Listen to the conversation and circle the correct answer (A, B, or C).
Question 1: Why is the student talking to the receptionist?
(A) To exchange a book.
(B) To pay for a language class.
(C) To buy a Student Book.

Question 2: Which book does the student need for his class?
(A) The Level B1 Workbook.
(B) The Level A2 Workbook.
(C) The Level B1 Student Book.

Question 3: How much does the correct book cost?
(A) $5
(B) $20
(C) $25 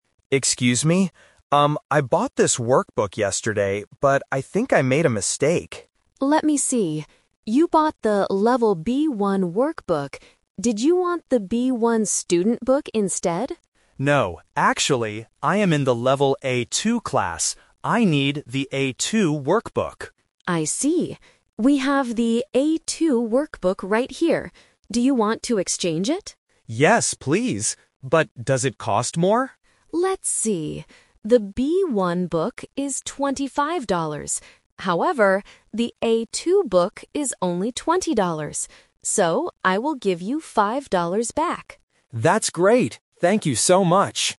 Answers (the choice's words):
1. To exchange a book.
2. The Level A2 Workbook.
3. $20

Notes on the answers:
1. The student has a workbook he bought by mistake and wants the correct one. The receptionist asks, "Do you want to exchange it?" and he replies, "Yes, please." Why the trap is wrong: Option (C) is the trap (The Twist). The receptionist asks if he wanted the "Student Book instead," but he says "No." Option (B) is a plausible guess for a language center but was not mentioned.
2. The student clearly states his level and need: "I am in the Level A2 class. I need the A2 Workbook." Why the trap is wrong: Option (A) is the trap. The Level B1 Workbook is the book he bought by mistake, not the one he needs. Option (C) is the book the receptionist guessed he wanted.
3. The receptionist gives the price of the new book he needs: "...the A2 book is only twenty dollars." Why the trap is wrong: Option (C) is the first trap. $25 is the price of the wrong book (the B1 book). Option (A) is the second trap. $5 is the amount of money the student gets back (his change), not the price of the book.